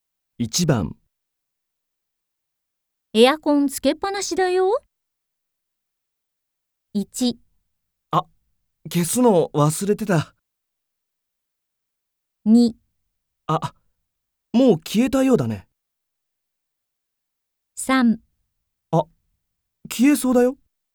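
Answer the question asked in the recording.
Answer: 1: あ、消すの忘れてた。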